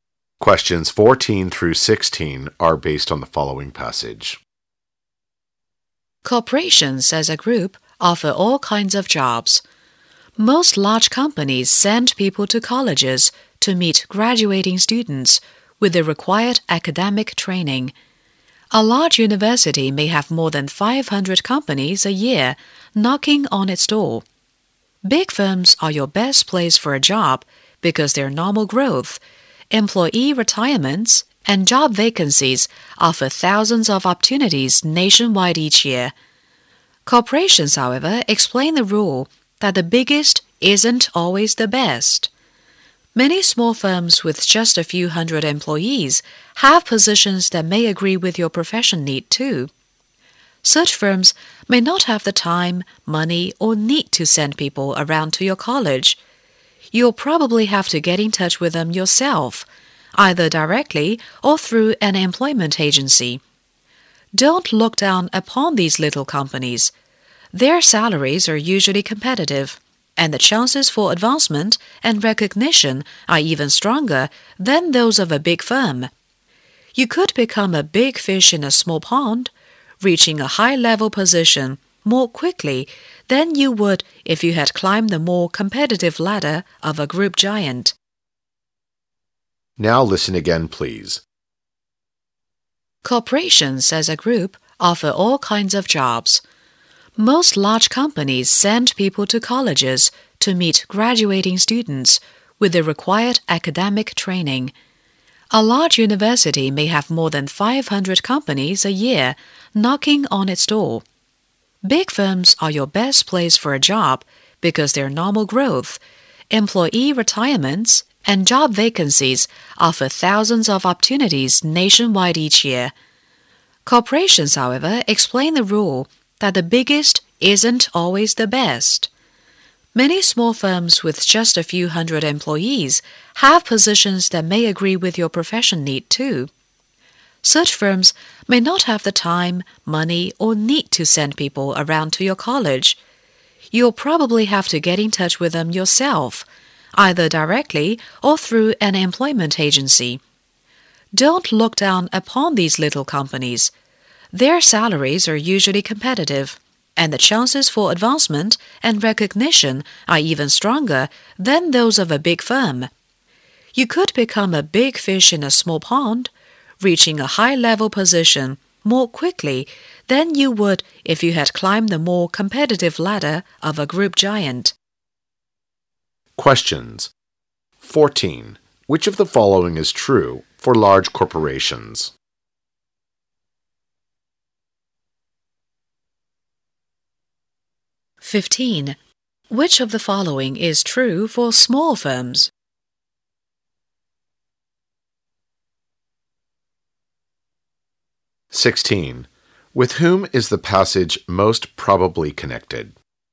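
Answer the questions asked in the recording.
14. They send people to colleges to recruit graduating students
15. They offer competitive salaries and better chances for advancement
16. College graduates looking for jobs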